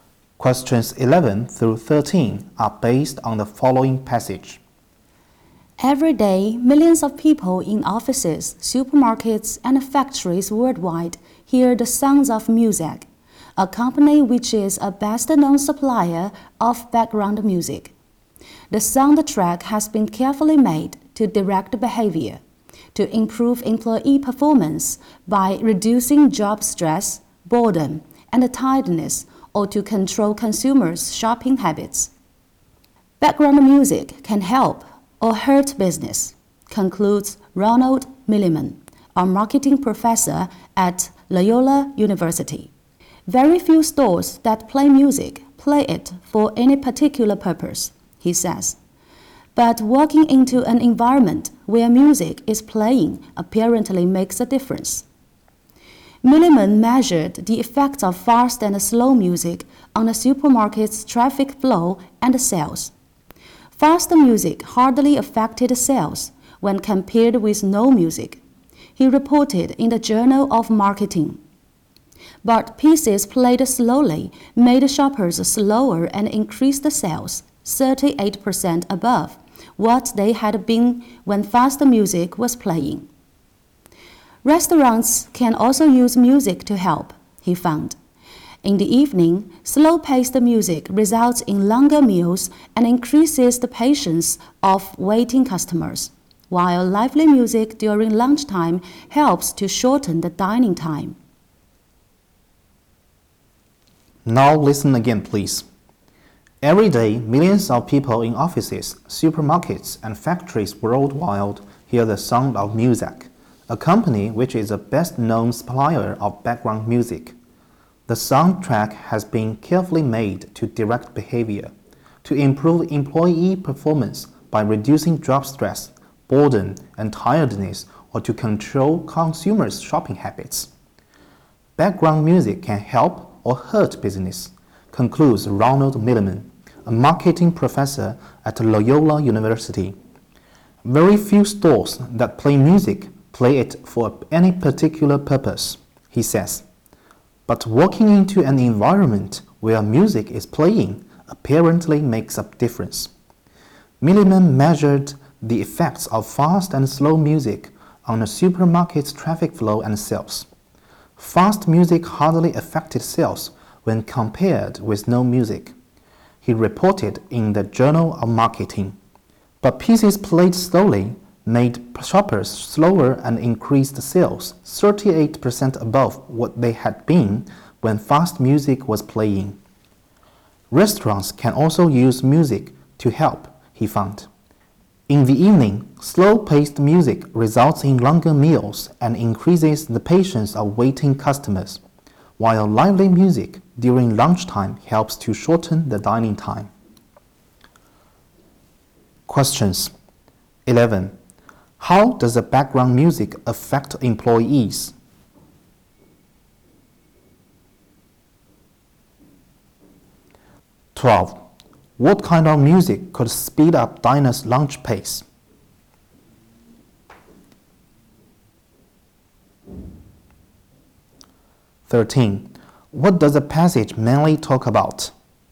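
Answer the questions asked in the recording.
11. It improves their performance by reducing job stress, boredom and tiredness
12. Lively music
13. The effects of background music on business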